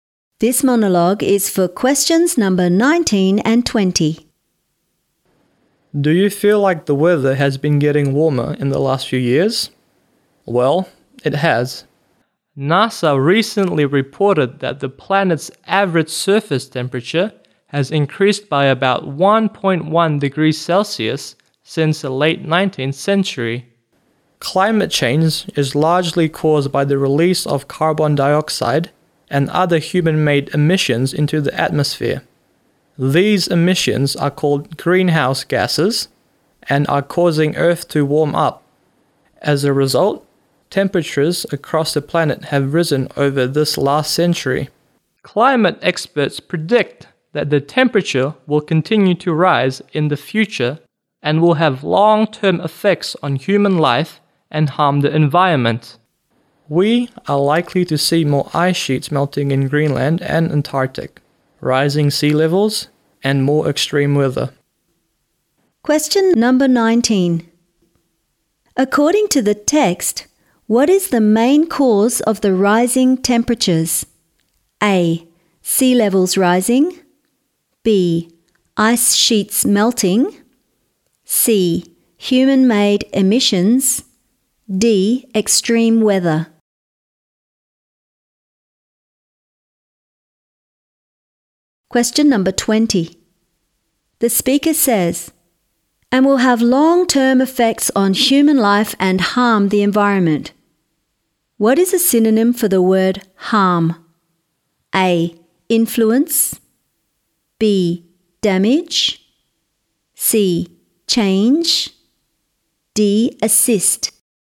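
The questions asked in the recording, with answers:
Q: According to the text, what is the main cause of the rising temperatures?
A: C: Human-made emissions.

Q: What is a synonym for the word harm?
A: B: Damage.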